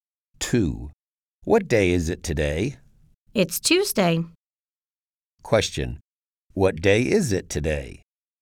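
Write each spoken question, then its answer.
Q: What day is it today?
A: Tuesday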